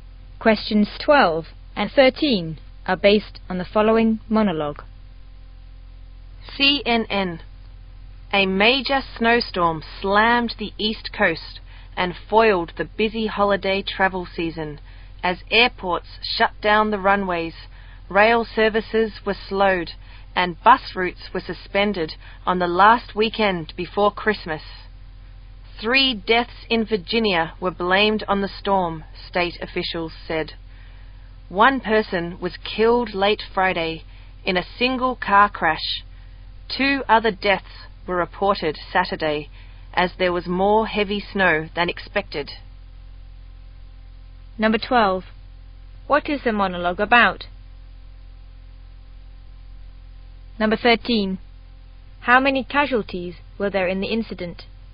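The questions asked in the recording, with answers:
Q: What is the monologue about?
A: A major snowstorm on the East Coast

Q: How many casualties were there in the incident?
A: Three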